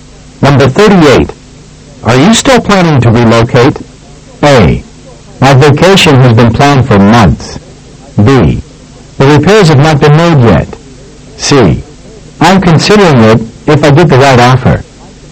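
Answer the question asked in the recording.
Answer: C: I'm considering it if I get the right offer.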